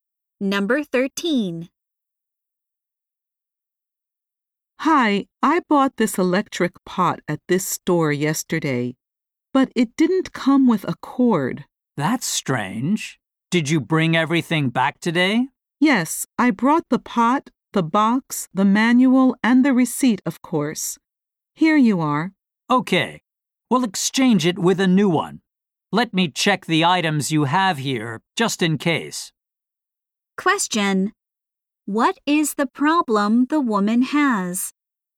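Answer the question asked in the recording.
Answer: The electric pot didn't come with a cord.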